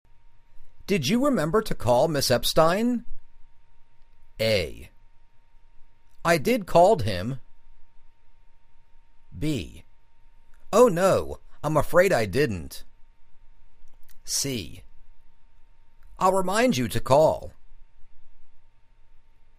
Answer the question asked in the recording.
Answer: Oh no. I'm afraid I didn't.